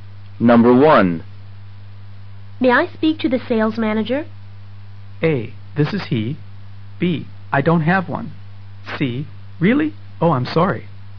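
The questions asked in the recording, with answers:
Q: May I speak to the sales manager?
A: A: This is he.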